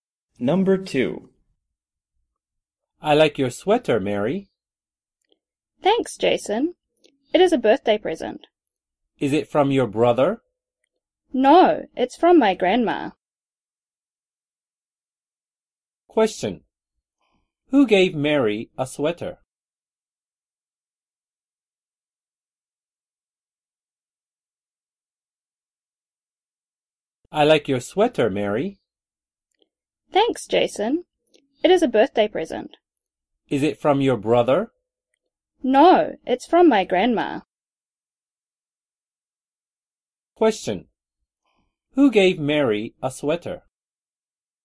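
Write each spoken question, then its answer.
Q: Who gave Mary a sweater?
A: Her grandma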